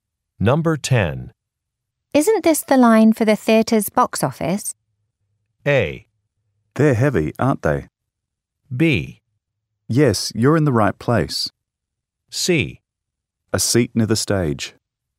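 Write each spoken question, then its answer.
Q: Isn't this the line for the theater's box office?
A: B: Yes, you're in the right place.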